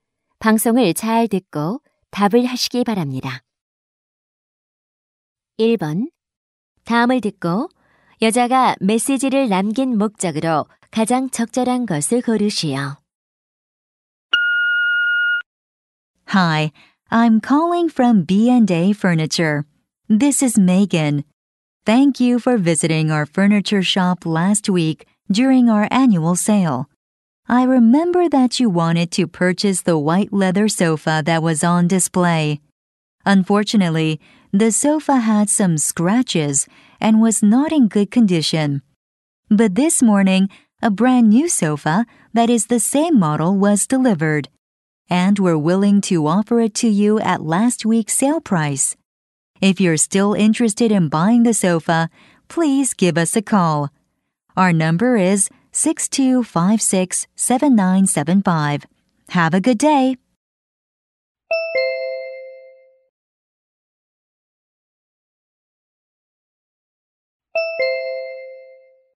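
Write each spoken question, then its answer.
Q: 다음을 듣고 여자가 메시지를 남긴 목적으로 가장 적절한 것을 고르시오.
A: 새 소파를 지난주 세일 가격에 구매할 수 있음을 알리려고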